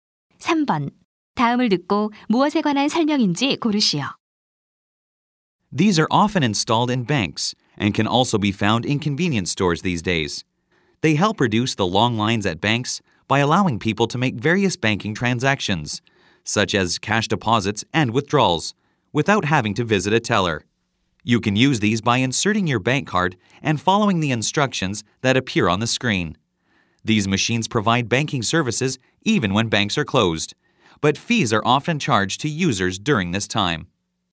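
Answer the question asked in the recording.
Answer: 현금 자동 입출금기(ATM)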